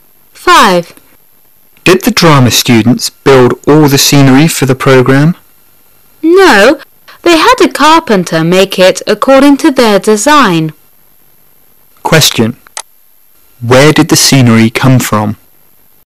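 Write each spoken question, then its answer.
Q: Where did the scenery come from?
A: A carpenter made it from the students' design.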